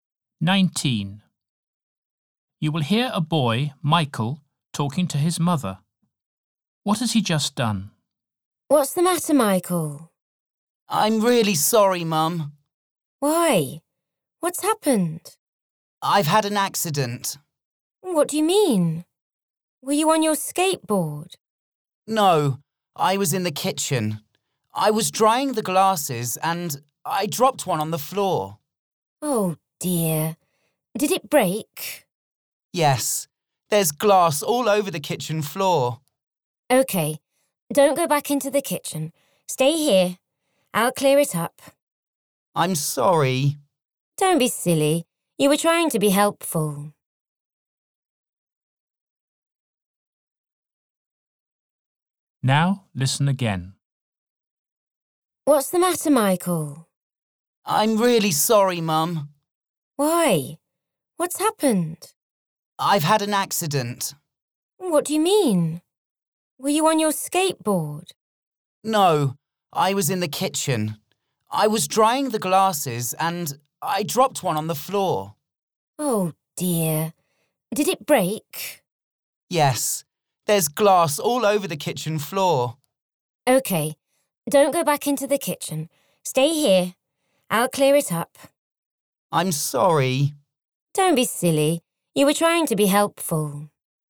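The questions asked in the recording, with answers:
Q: What has he just done?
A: He dropped a glass and broke it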